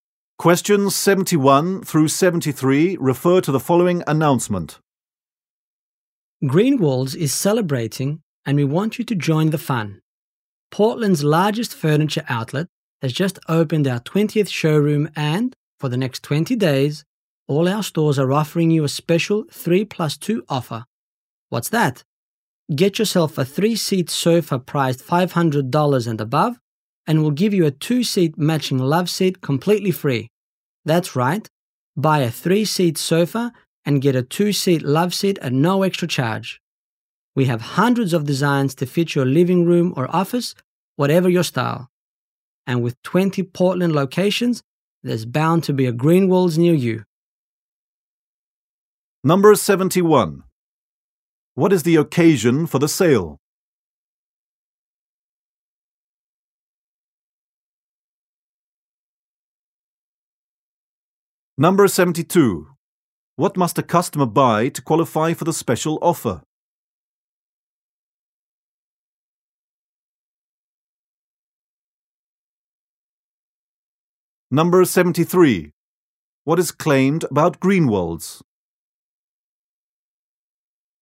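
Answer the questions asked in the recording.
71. The opening of the store's 20th showroom
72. A 3-seat sofa priced $500 or more
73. It is Portland's largest furniture outlet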